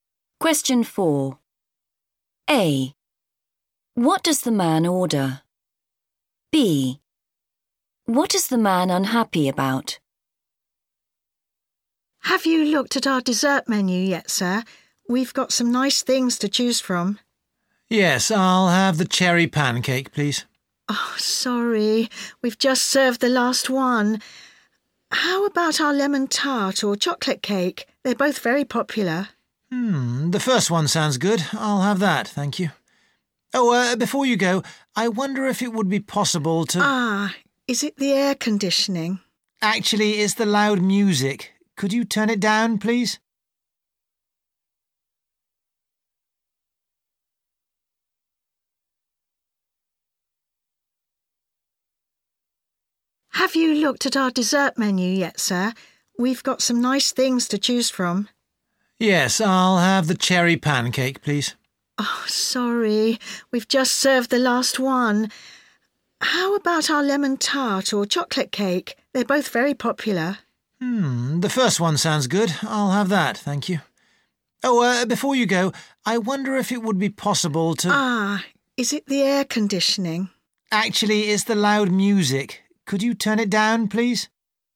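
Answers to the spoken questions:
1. Lemon tart
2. The loud music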